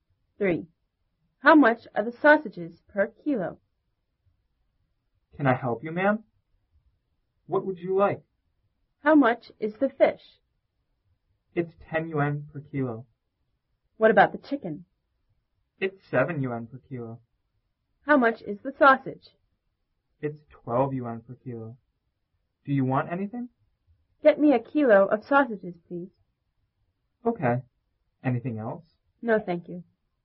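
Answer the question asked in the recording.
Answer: 12 yuan per kilo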